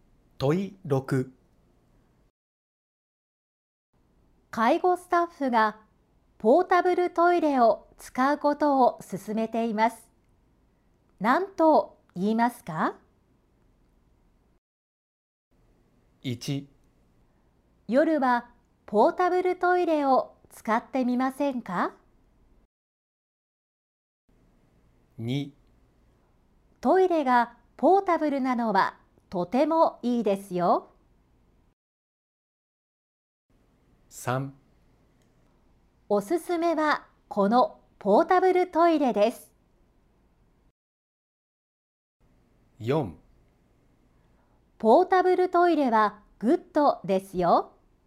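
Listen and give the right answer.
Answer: 1: 夜はポータブルトイレを使ってみませんか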